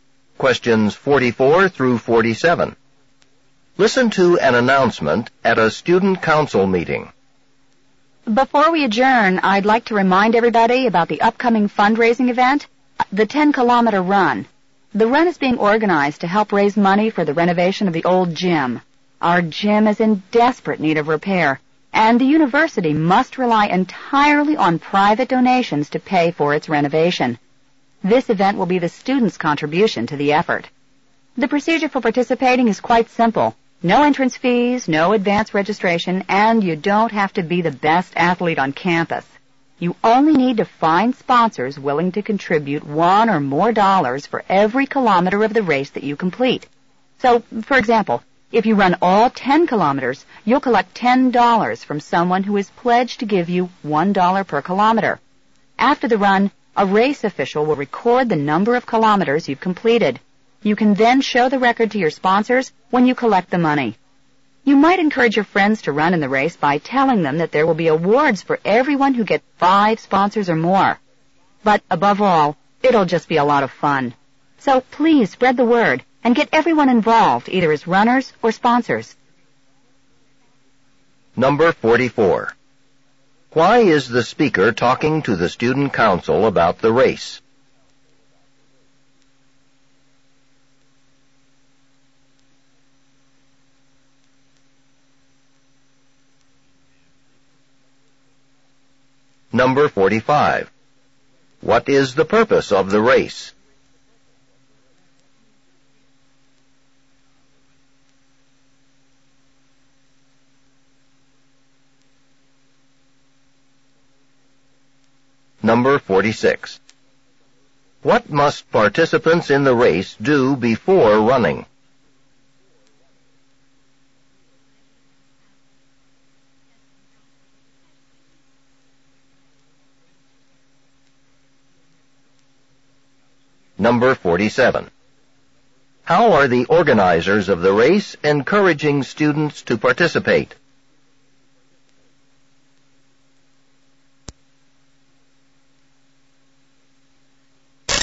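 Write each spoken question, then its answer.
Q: Why is the speaker talking to the student council about the race?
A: To remind them about the upcoming fundraising run

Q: What is the purpose of the race?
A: To raise money to renovate the old gym

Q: What must participants in the race do before running?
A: Find sponsors

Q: How are the organizers of the race encouraging students to participate?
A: By offering awards to everyone who gets 5 or more sponsors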